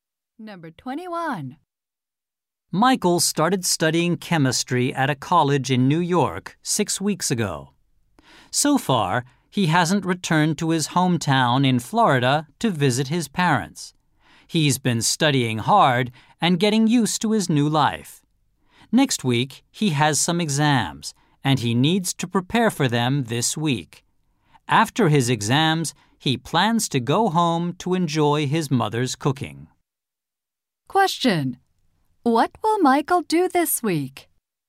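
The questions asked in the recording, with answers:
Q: What will Michael do this week?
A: Prepare for his exams.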